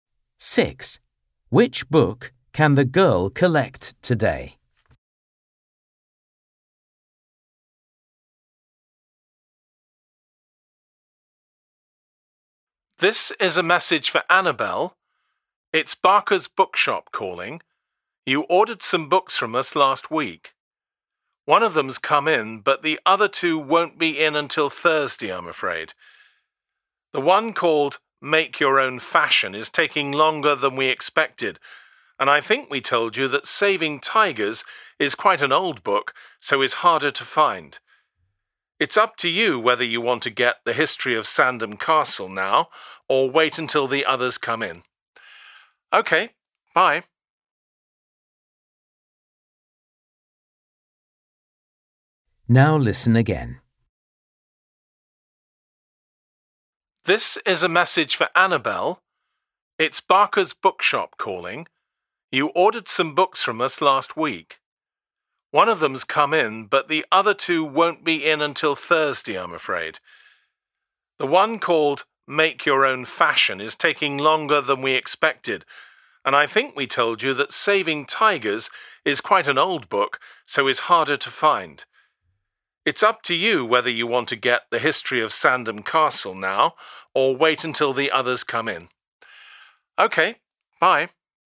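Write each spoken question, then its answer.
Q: Which book can the girl collect today?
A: The History of Sandham Castle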